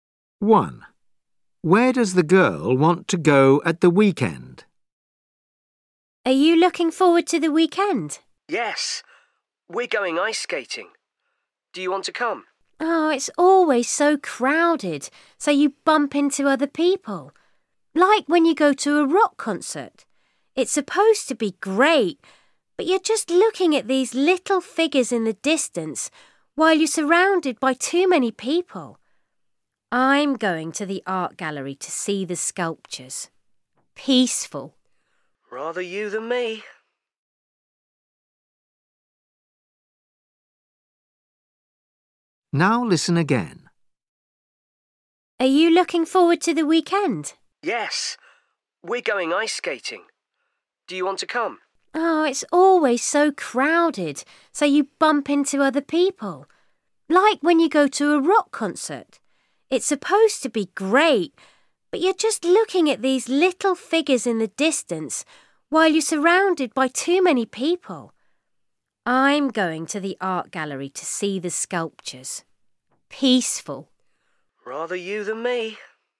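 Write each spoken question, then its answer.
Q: Where does the girl want to go at the weekend?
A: the art gallery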